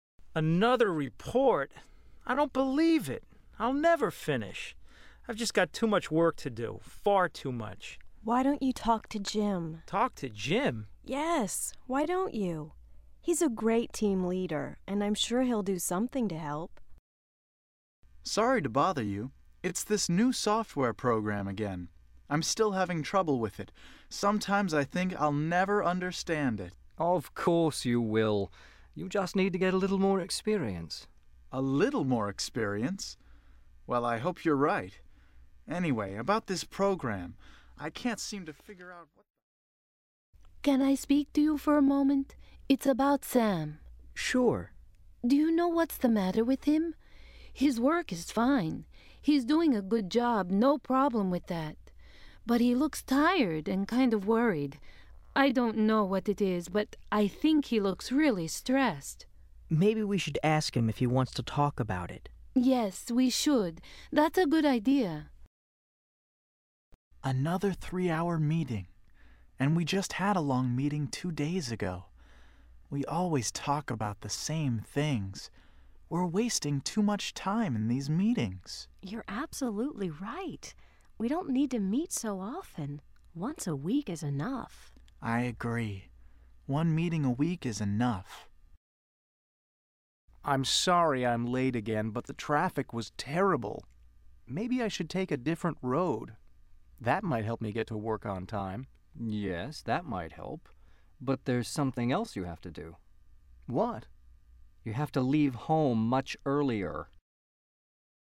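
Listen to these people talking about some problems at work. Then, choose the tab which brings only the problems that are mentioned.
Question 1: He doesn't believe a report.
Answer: mentioned

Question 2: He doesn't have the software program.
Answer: not mentioned

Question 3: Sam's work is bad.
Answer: not mentioned

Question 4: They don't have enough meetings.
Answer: not mentioned

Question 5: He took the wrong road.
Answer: not mentioned

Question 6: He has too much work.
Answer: mentioned

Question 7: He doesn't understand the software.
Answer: mentioned

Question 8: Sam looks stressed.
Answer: mentioned

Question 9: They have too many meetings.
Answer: mentioned

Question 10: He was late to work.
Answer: mentioned

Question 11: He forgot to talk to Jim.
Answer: not mentioned

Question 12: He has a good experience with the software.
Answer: not mentioned

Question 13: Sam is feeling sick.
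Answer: not mentioned

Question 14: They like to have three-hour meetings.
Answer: not mentioned

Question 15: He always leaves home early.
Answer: not mentioned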